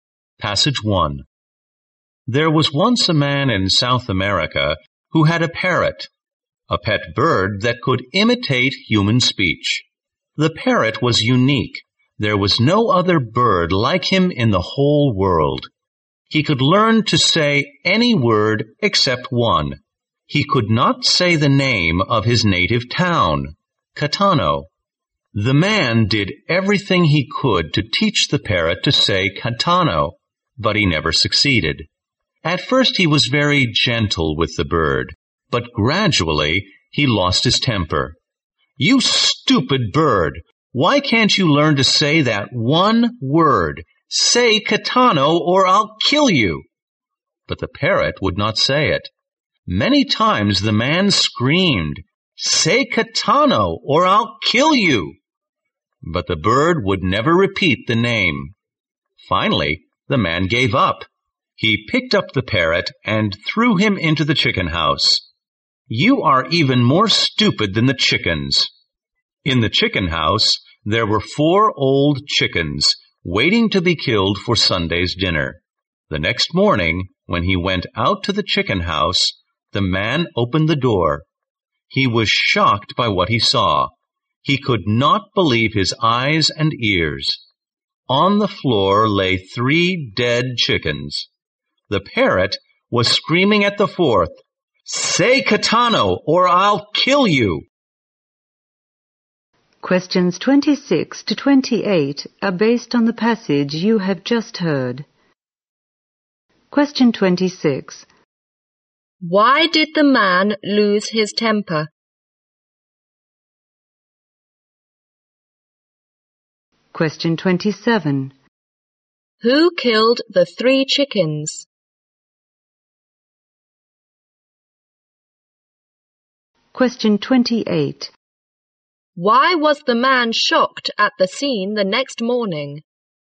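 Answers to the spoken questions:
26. The parrot couldn't say the name of his town, Catano.
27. The parrot.
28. The parrot had killed three chickens and was threatening the fourth to say Catano.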